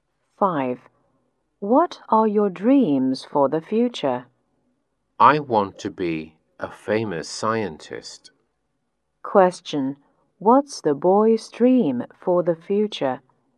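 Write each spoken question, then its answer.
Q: What's the boy's dream for the future?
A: To be a famous scientist.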